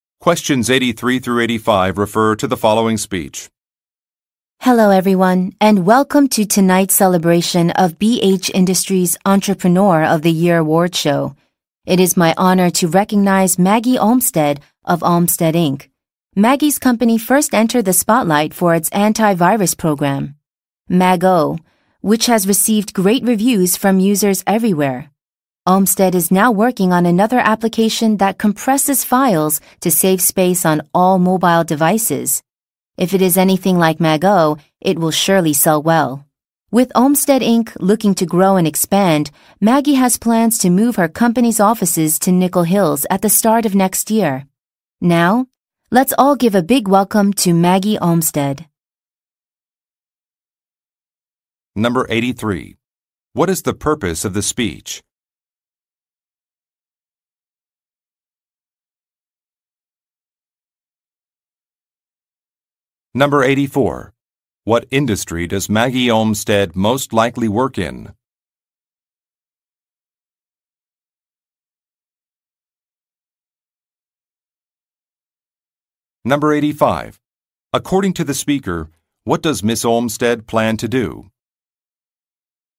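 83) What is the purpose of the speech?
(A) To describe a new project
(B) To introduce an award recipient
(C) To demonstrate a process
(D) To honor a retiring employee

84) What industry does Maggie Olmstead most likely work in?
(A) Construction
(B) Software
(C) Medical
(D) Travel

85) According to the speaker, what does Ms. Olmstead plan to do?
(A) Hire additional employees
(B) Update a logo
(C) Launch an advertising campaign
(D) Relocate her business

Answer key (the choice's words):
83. To introduce an award recipient
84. Software
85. Relocate her business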